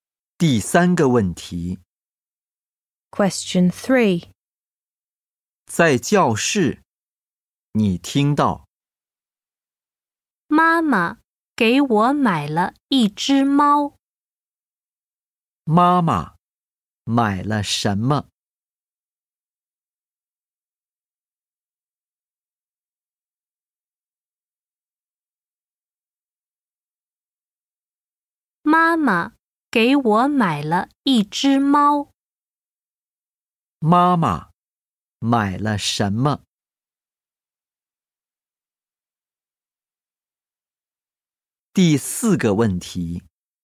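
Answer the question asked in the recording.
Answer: 一只猫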